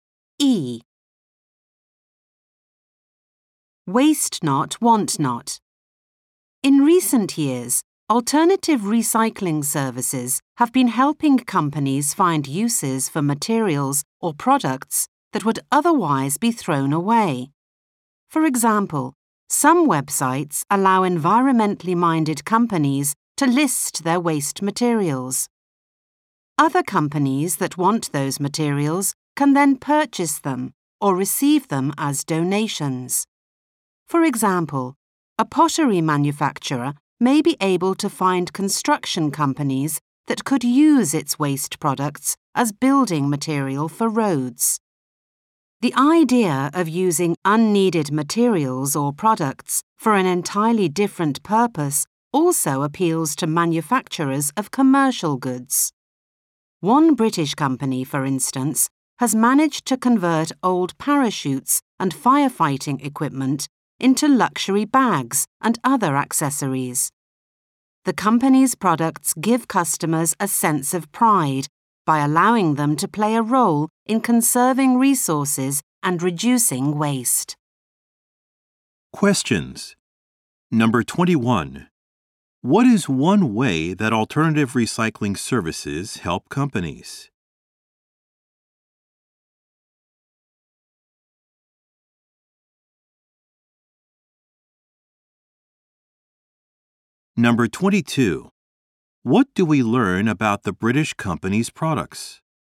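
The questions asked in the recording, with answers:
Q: What is one way that alternative recycling services help companies?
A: They help them find companies that can use their waste materials

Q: What do we learn about the British company's products?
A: They are made from old parachutes and firefighting equipment and give customers a sense of pride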